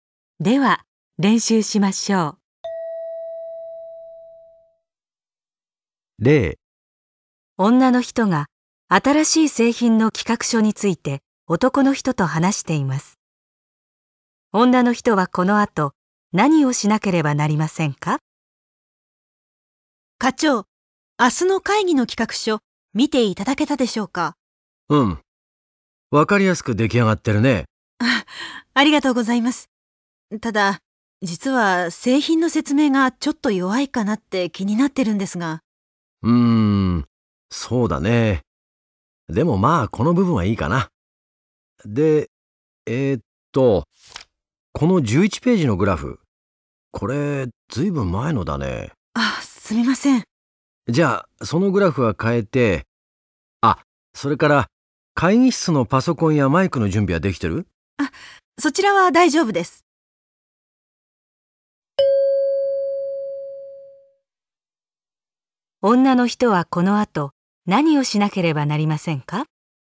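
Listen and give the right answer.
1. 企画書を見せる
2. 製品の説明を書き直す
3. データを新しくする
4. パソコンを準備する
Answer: 3. データを新しくする

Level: N1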